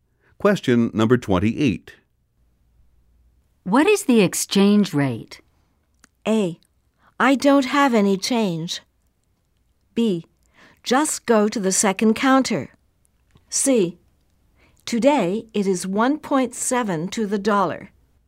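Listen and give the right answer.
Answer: C: Today it is 1.7 to the dollar.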